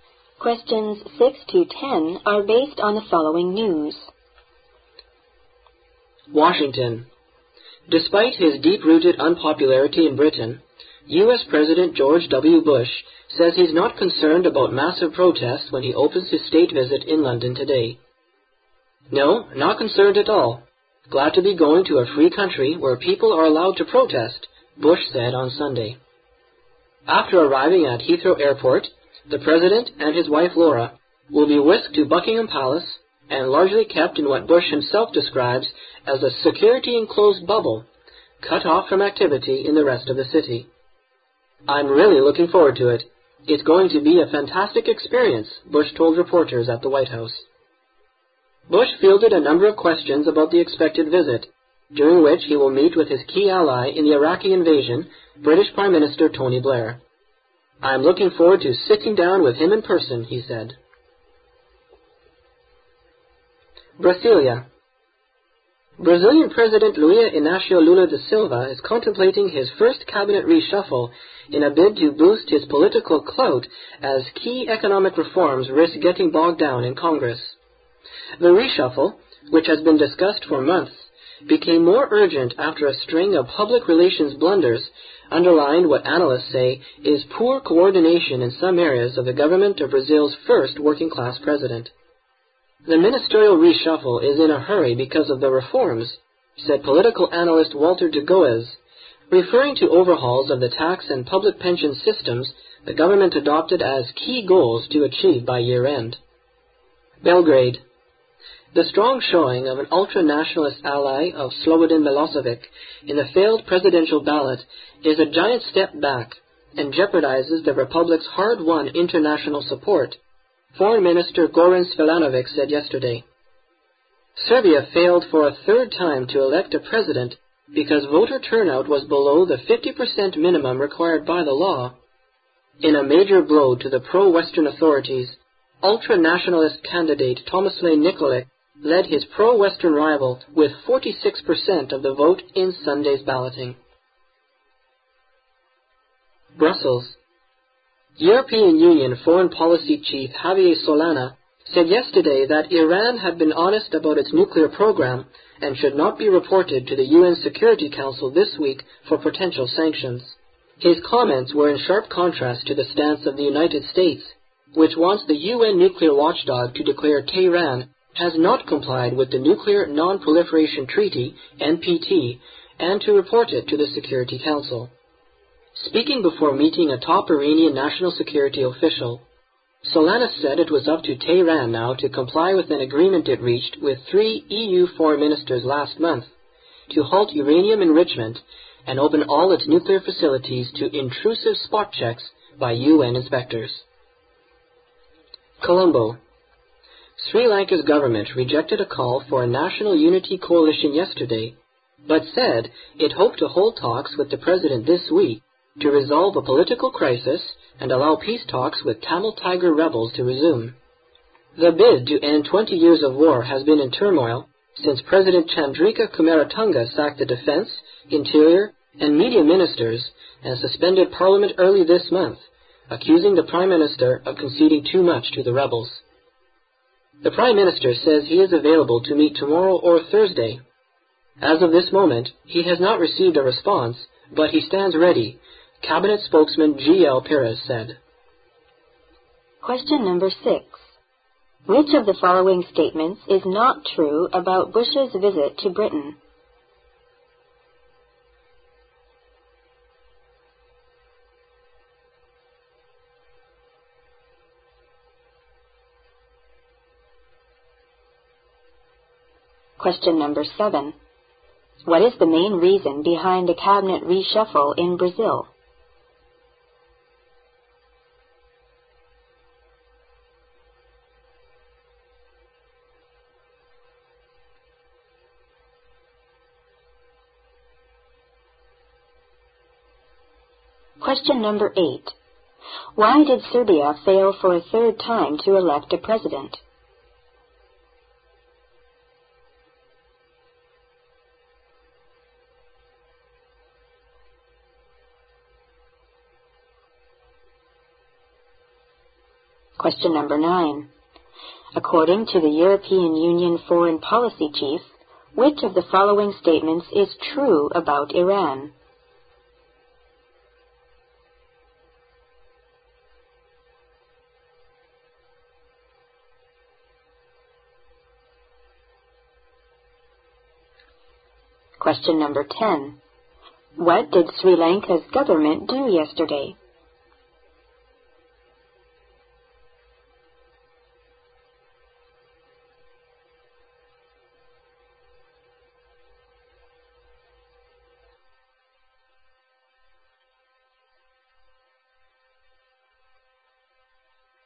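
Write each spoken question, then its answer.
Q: What is the main reason behind the cabinet reshuffle in Brazil?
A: To boost his political clout so key economic reforms don't get bogged down in Congress

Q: Why did Serbia fail for a third time to elect a president?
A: Voter turnout was below the 50% minimum required by law

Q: What did Sri Lanka's government do yesterday?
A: It rejected a call for a national unity coalition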